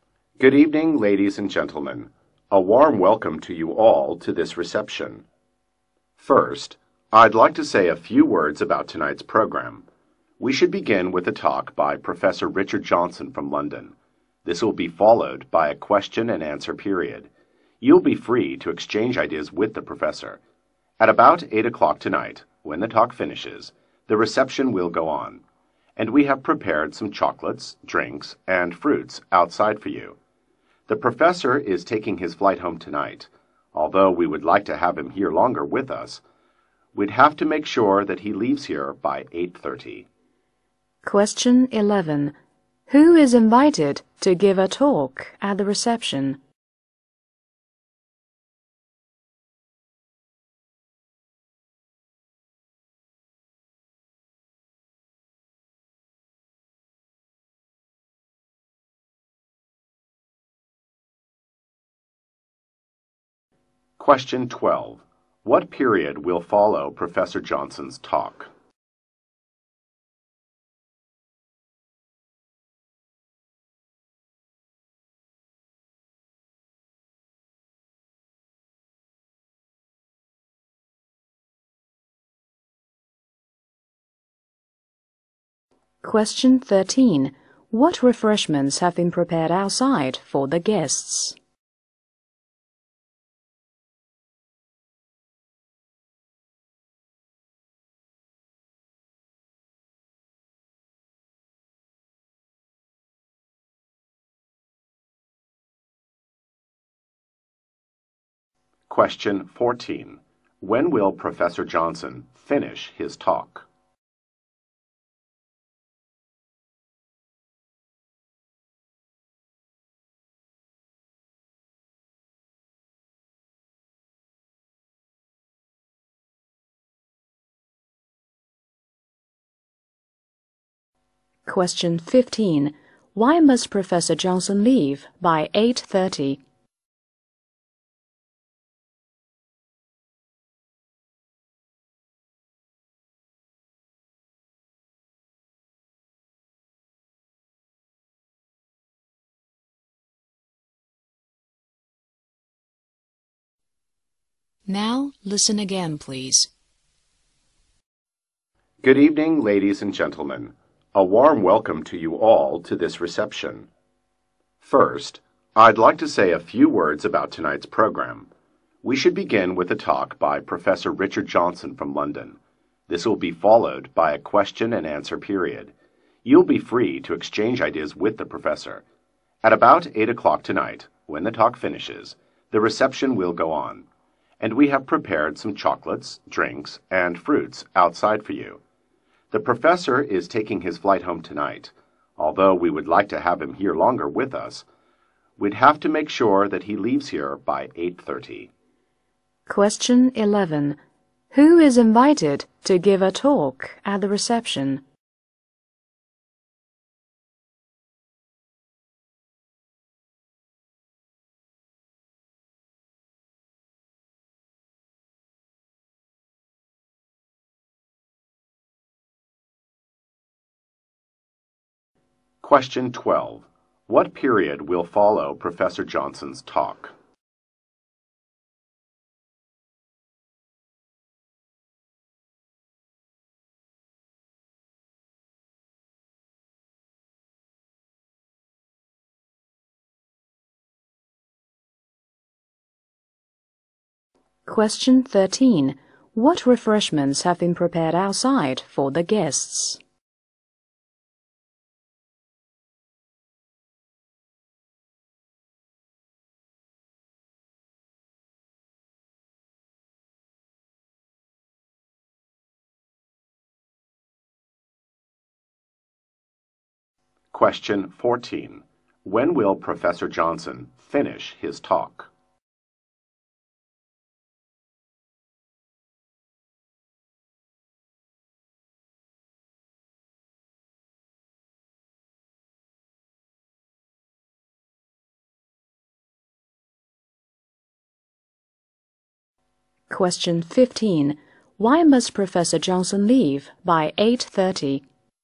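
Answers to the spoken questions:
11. Professor Richard Johnson
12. A question and answer period
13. Chocolates, drinks and fruits
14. At about 8 o'clock
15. He is taking his flight home tonight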